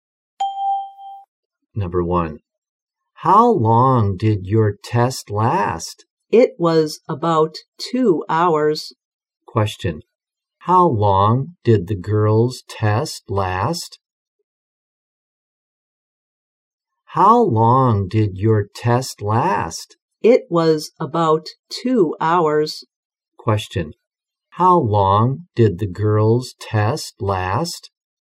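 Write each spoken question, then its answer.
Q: How long did the girl's test last?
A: About 2 hours.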